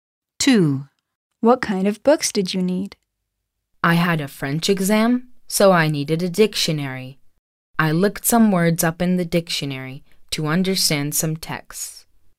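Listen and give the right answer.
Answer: A (French) dictionary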